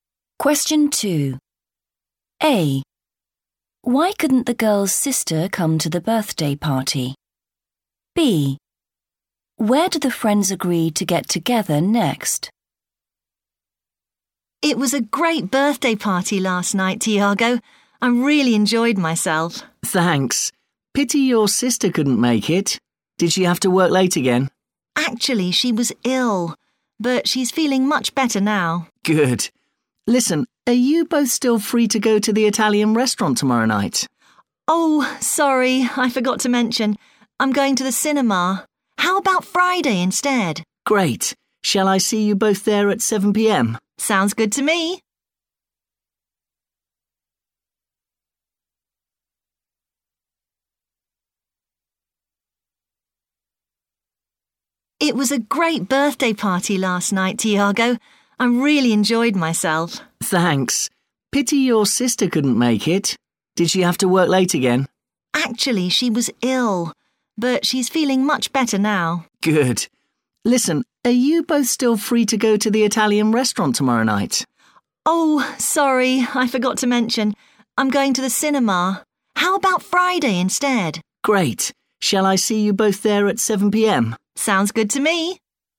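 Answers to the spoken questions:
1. she was ill
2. Italian restaurant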